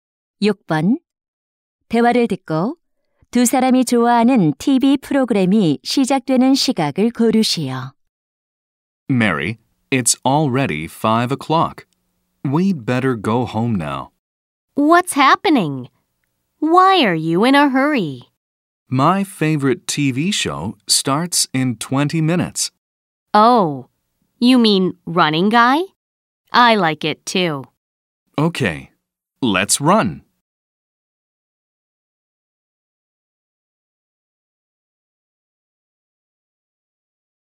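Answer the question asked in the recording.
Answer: 5시 20분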